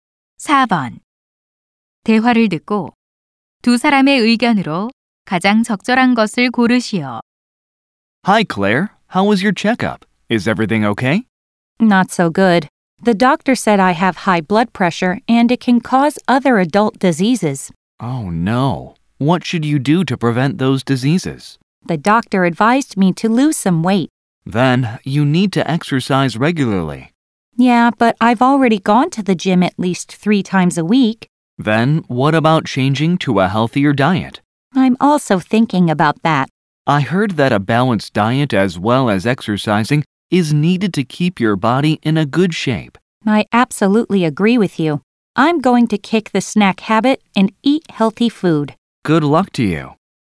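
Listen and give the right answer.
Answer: 건강 유지를 위해 운동과 함께 균형 잡힌 식단이 필요하다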